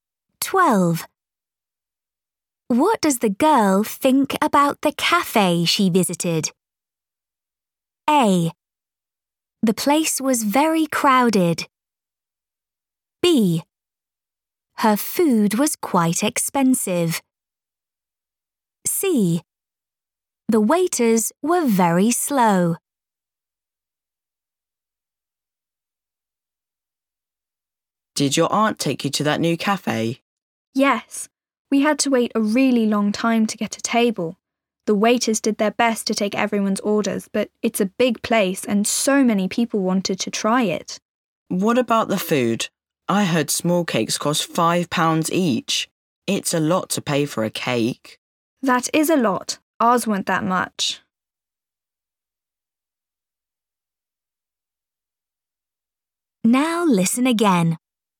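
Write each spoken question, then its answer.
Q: What does the girl think about the cafe she visited?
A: A: The place was very crowded.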